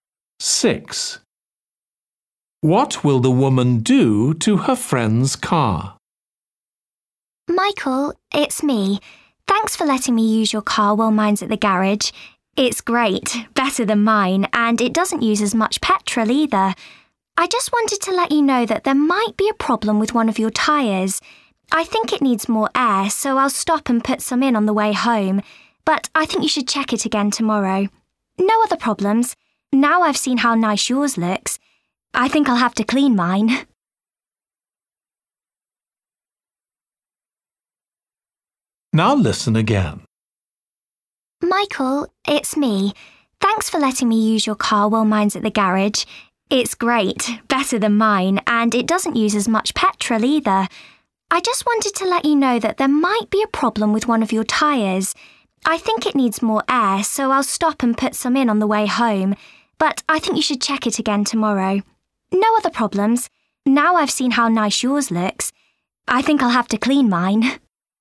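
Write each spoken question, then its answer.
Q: What will the woman do to her friend's car?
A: Put air in one of the tyres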